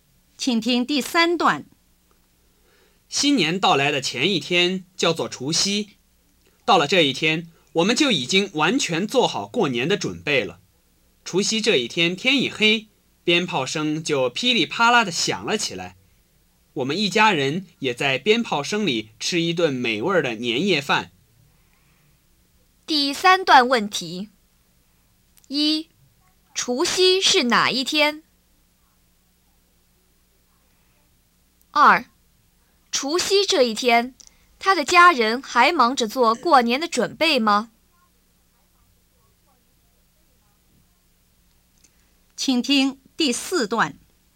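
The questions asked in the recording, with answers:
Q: 除夕是哪一天?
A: 新年到来的前一天

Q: 除夕这一天,他的家人还忙着做过年的准备吗?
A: 不忙了,已经完全准备好了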